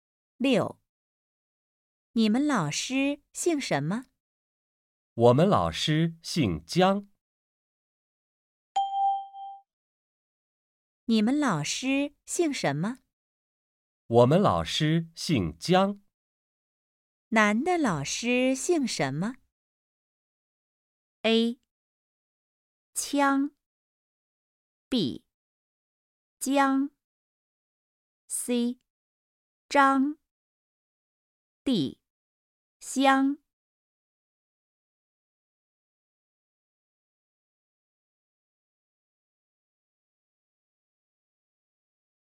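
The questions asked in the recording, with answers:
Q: 男的老师姓什么?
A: B: 江。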